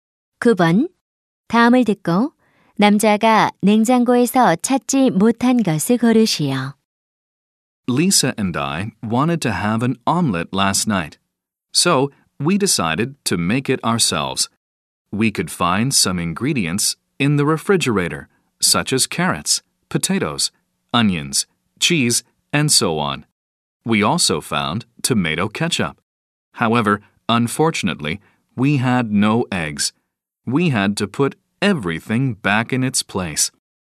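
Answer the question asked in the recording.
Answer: 달걀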